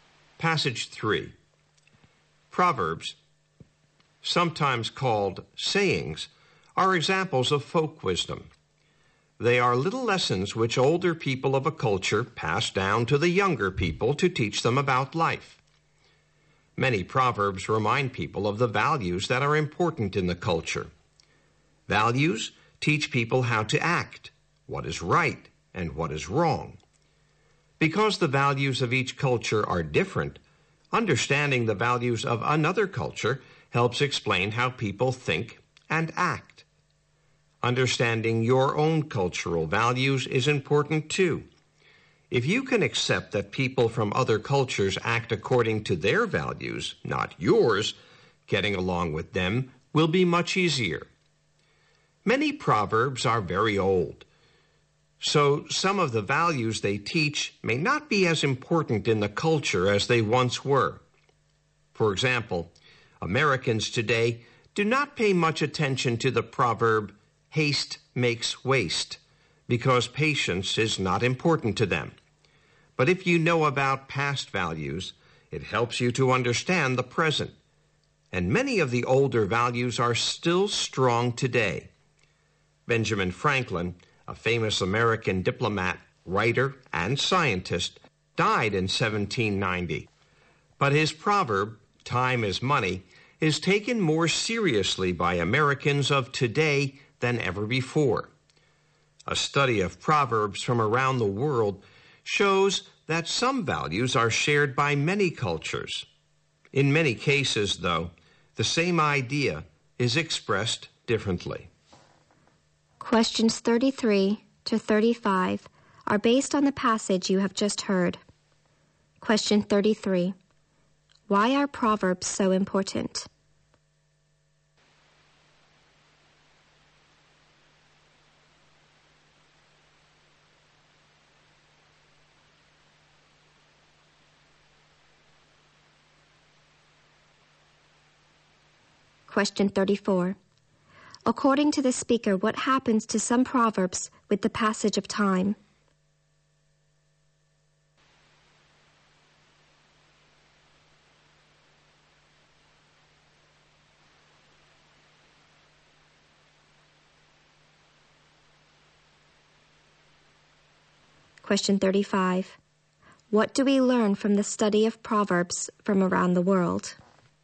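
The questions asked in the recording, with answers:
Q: Why are proverbs so important?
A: They teach younger people a culture's values

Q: According to the speaker, what happens to some proverbs with the passage of time?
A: The values they teach may become less important

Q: What do we learn from the study of proverbs from around the world?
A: Many cultures share some values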